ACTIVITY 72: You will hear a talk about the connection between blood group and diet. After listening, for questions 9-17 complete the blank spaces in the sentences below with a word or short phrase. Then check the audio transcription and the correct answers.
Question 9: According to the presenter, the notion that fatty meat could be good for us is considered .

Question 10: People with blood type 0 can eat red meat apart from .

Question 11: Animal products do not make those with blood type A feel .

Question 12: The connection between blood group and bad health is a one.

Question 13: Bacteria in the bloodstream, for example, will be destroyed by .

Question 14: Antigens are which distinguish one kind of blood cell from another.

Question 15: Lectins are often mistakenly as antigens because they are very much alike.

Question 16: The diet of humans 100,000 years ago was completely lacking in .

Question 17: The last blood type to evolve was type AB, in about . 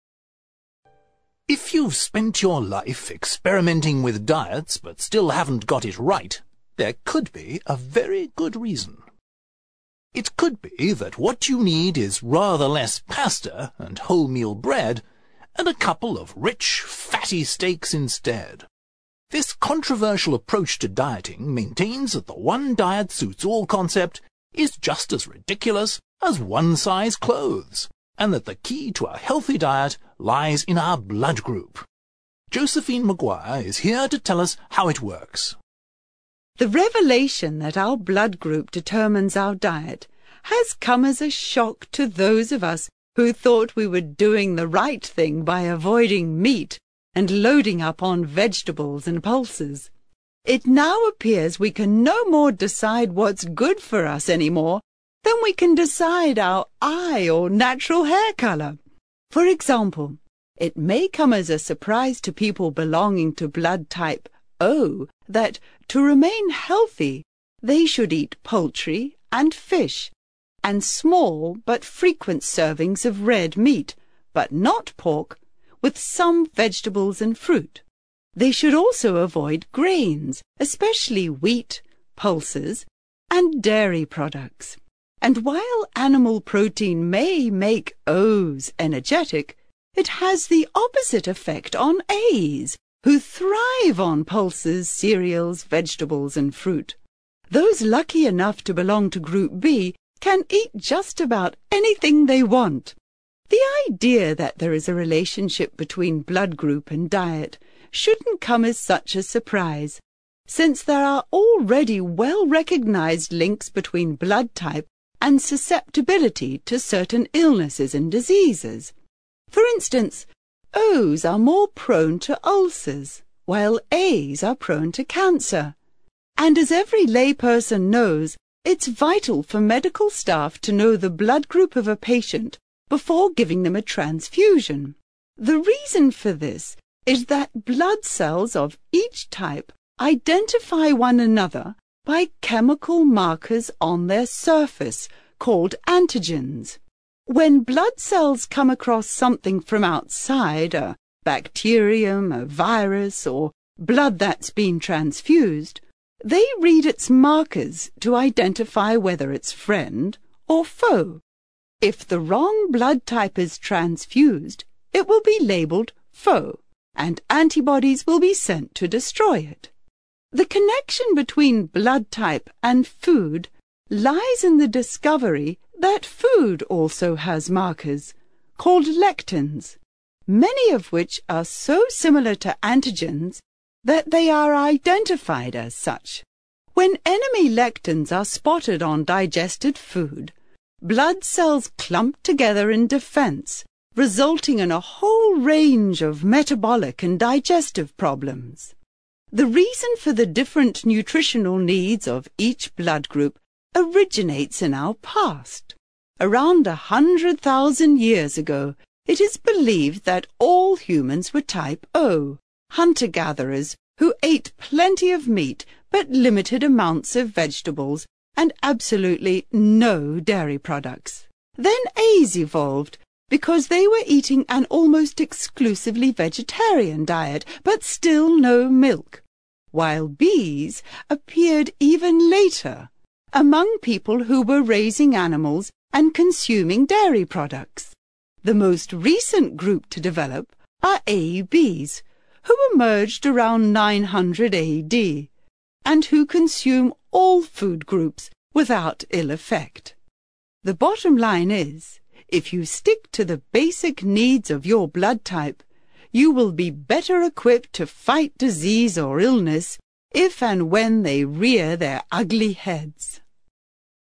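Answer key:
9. controversial
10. pork
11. energetic
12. well-recognized
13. antibodies
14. chemical markers
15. identified
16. dairy products
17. 900 AD

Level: CPE Proficiency English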